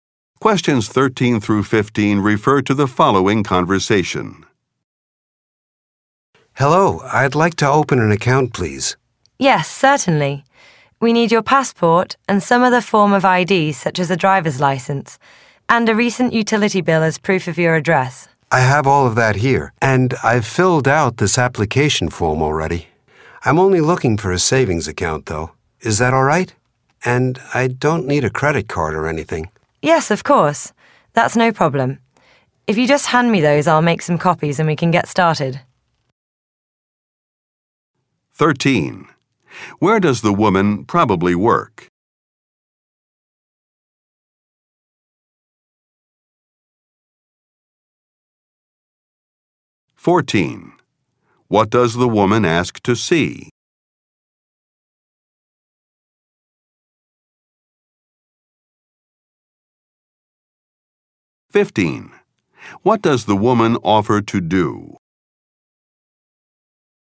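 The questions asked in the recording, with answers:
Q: Where does the woman probably work?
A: At a bank

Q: What does the woman ask to see?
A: A passport, another ID and a recent utility bill

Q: What does the woman offer to do?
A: Make copies of the documents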